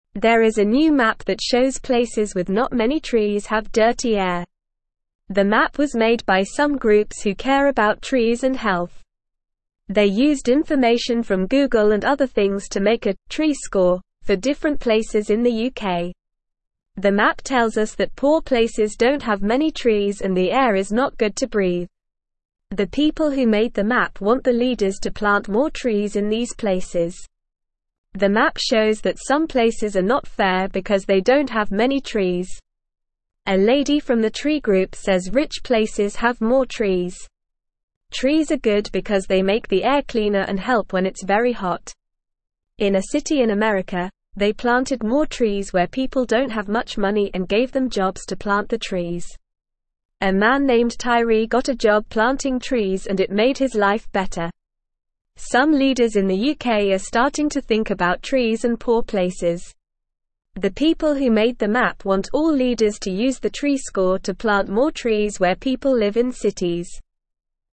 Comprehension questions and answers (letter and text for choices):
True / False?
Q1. There is no new map that shows places without many trees have dirty air.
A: False

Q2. The map does not tell us that poor places don't have many trees and the air is not good to breathe.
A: False

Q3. The people who made the map want the leaders to plant more trees in these places.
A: True

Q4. Some leaders in the UK are not starting to think about trees and poor places.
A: False

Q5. The map was not made by groups who care about trees and health.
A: False

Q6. Trees are good because they make the air cleaner and help when it's very hot.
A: True

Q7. How did the groups make the "tree score" for different places?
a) They asked people about the number of trees in their area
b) They counted the number of trees themselves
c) They used information from Google and other things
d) They guessed the number of trees in each place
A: c) They used information from Google and other things

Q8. What does the map tell us about poor places?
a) They don't have many trees and the air is not good to breathe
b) They have many trees and the air is not good to breathe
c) They don't have many trees and the air is good to breathe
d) They have many trees and the air is good to breathe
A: a) They don't have many trees and the air is not good to breathe

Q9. Why are trees good?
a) They make the air dirtier and help when it's very hot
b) They make the air cleaner and make it colder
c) They make the air dirtier and make it colder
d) They make the air cleaner and help when it's very hot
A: d) They make the air cleaner and help when it's very hot

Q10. What did they do in a city in America to help people who don't have much money?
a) They planted more trees and gave them money to buy trees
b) They planted more trees and gave them free trees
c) They planted more trees and gave them free air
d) They planted more trees and gave them jobs to plant the trees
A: d) They planted more trees and gave them jobs to plant the trees

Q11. Who got a job planting trees in the city in America?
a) A lady named Tree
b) A man named Tyree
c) A man named Tree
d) A lady named Tyree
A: b) A man named Tyree

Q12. What are some leaders in the UK starting to think about?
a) Trees and rich places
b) Trees and poor places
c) Trees and clean air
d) Trees and jobs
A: b) Trees and poor places

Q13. What do the people who made the map want all leaders to do?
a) Use the tree score to cut down trees where people live in cities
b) Use the tree score to plant more trees where people live in forests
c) Use the tree score to plant more trees where people live in cities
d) Use the tree score to cut down trees where people live in forests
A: c) Use the tree score to plant more trees where people live in cities

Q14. There is a new map that shows places with not (1)______ trees have (2)______ air.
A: many

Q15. There is a new map that shows places with not (1)______ trees have (2)______ air.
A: dirty

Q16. The map tells us that poor places don't (3)______ many trees and the air is not good to breathe.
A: have

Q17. The people who made the map (4)______ the leaders to plant more trees in these places.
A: want

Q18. A lady from the tree group (5)______ rich places have more trees.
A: says

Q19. Trees are (6)______ because they make the air cleaner and help when it's very hot.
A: good

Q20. Some leaders in the UK are (7)______ to think about trees and poor places.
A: starting

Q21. Why is the air not good to breathe in places with not many trees?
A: The air is not good to breathe because there are not many trees to clean it.

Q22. What do trees do to the air?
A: Trees make the air cleaner.

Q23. Who made the map?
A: Some groups who care about trees and health made the map.

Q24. What did they use to make the "tree score"?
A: They used information from Google and other things to make the "tree score".

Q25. What do the people who made the map want the leaders to do?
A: The people who made the map want the leaders to plant more trees in places with not many trees.

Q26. What happened to Tyree when he got a job planting trees?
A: When Tyree got a job planting trees, it made his life better.

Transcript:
There is a new map that shows places with not many trees have dirty air. The map was made by some groups who care about trees and health. They used information from Google and other things to make a "tree score" for different places in the UK. The map tells us that poor places don't have many trees and the air is not good to breathe.
The map shows that some places are not fair because they don't have many trees. A lady from the tree group says rich places have more trees. In a city in America, they planted more trees where people don't have much money and gave them jobs to plant the trees. A man named Tyree got a job planting trees and it made his life better. Some leaders in the UK are starting to think about trees and poor places. The people who made the map want all leaders to use the tree score to plant more trees where people live in cities.

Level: Level 1